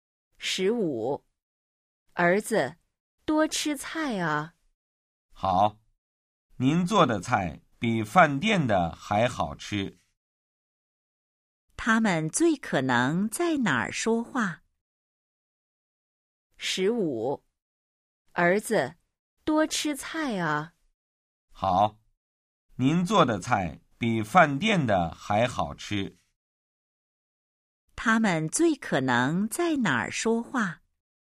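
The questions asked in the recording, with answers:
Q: 他们最可能在哪儿说话?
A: 家里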